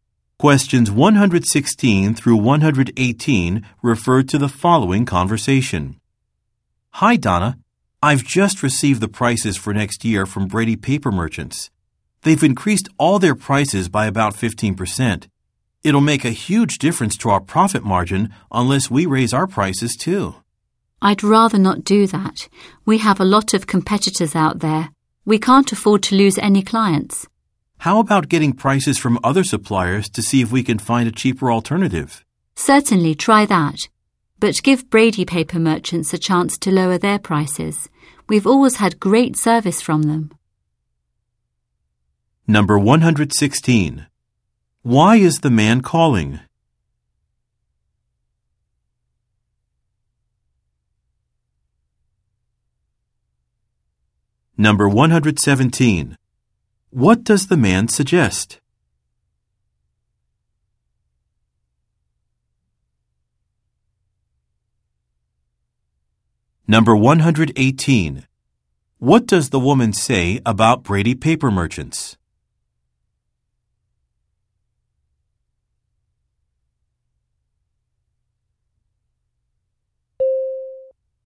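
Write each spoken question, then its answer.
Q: Why is the man calling?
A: To report that the supplier has raised its prices

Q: What does the man suggest?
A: Getting prices from other suppliers

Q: What does the woman say about Brady Paper Merchants?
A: They have always given great service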